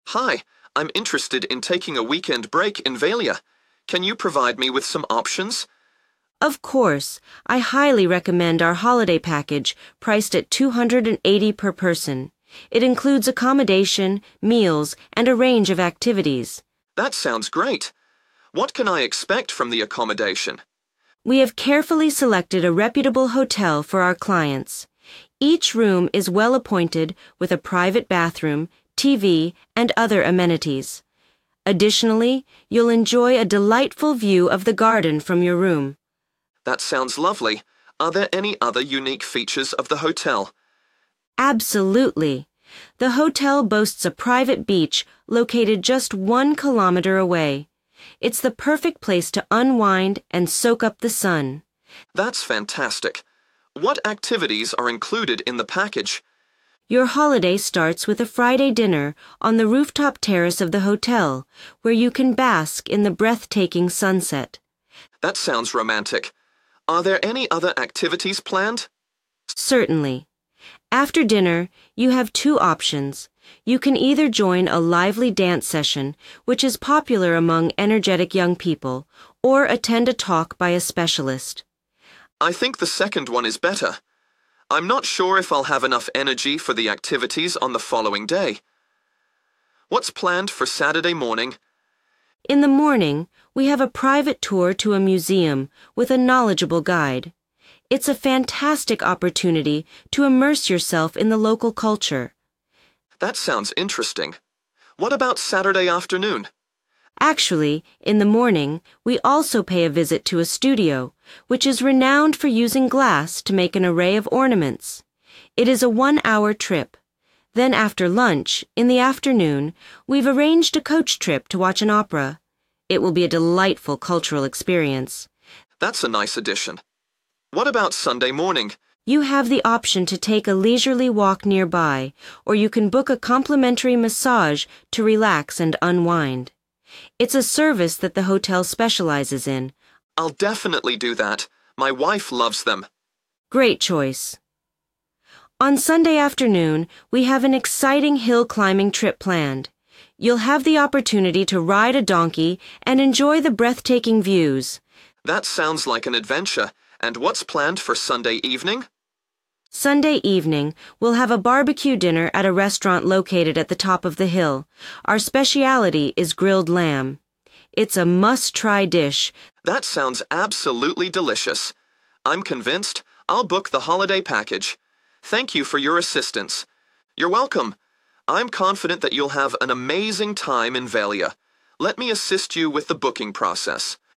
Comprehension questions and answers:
Complete the form below. Write ONE WORD AND/OR A NUMBER for each answer.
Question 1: Each room has a view of the 1. ...............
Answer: garden

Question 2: Access to a private 2. ............... (1 km)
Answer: beach

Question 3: dinner on the 3. ............... top terrace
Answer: rooftop

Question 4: dance or listen to a special 4. ...............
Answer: talk

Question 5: have a guided tour to a local 5. ...............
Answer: museum

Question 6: visit a studio famous for making 6. ............... ornaments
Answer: glass

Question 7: Saturday afternoon: Go to the 7. ............... by coach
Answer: opera

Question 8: Sunday morning: Book a free 8. ...............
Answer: massage

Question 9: Sunday afternoon: Climb a hill by taking a 9. ............... ride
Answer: donkey

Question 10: Sunday evening: a barbecue dinner (including grilled 10. ...............)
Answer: lamb